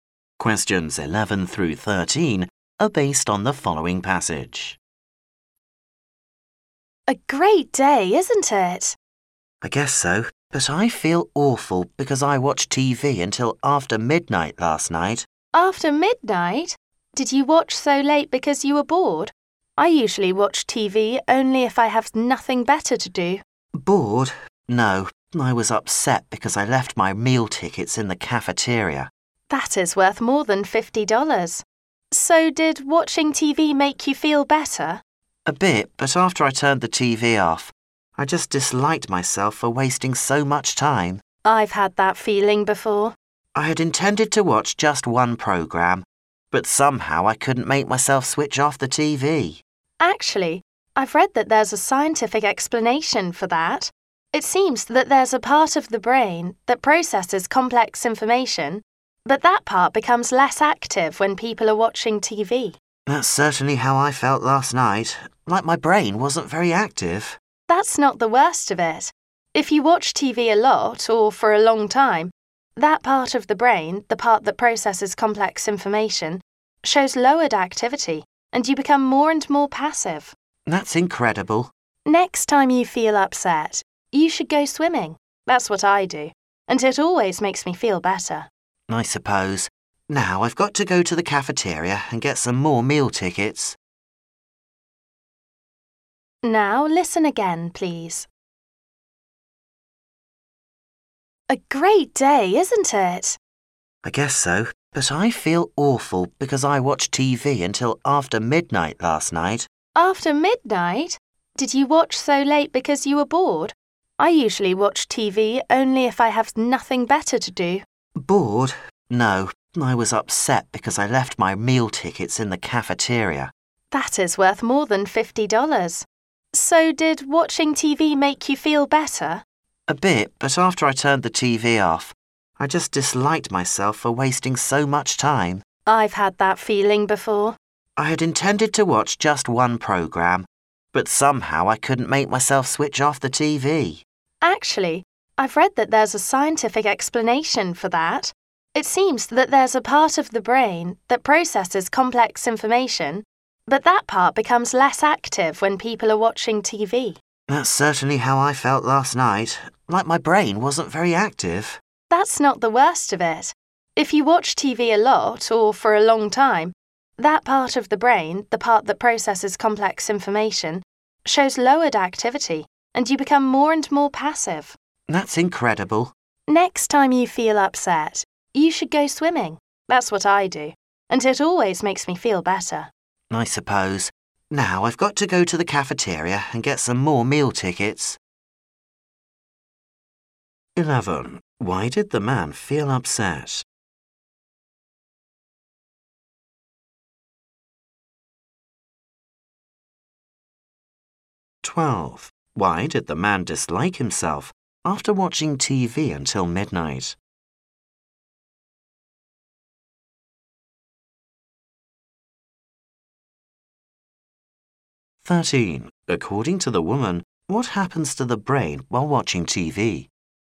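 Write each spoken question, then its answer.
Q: Why did the man feel upset?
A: He left his meal tickets in the cafeteria

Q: Why did the man dislike himself after watching TV until midnight?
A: He had wasted so much time

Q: According to the woman, what happens to the brain while watching TV?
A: The part that processes complex information becomes less active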